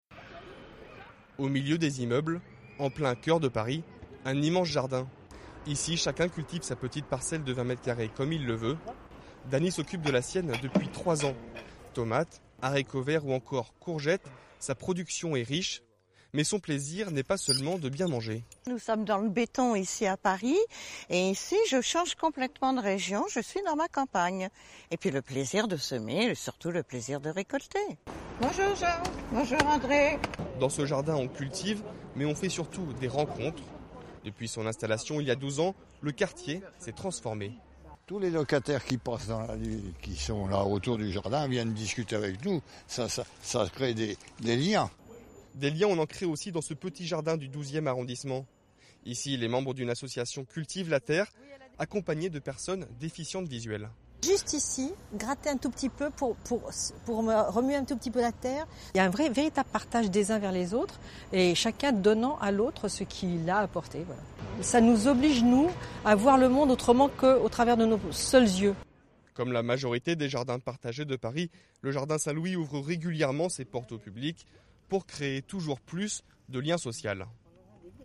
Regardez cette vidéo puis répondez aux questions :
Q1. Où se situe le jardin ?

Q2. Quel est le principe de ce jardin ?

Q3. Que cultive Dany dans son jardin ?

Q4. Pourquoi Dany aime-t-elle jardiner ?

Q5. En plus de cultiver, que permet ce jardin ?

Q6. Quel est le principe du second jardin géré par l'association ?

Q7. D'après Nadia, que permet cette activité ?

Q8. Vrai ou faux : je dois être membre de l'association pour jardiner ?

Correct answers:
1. En plein cœur de Paris (13e arrondissement) au milieu des immeubles.
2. Chacun cultive sa parcelle de 20 m2 comme il veut.
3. Des tomates, des haricots verts, des courgettes.
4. Pour avoir un coin de campagne « dans le béton », avoir le plaisir de semer et de récolter.
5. De faire des rencontres et créer des liens sociaux.
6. Cultiver la terre avec des personnes déficientes visuelles.
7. De partager les uns avec les autres.
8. Faux

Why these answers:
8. c'est souvent ouvert au public.

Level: Niveau 2 : intermédiaire